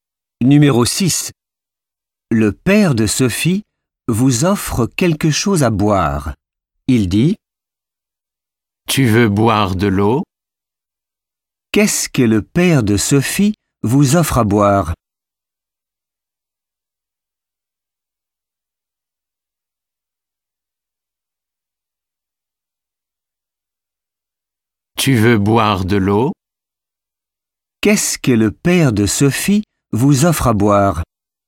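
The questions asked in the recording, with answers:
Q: Qu'est-ce que le père de Sophie vous offre à boire?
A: de l'eau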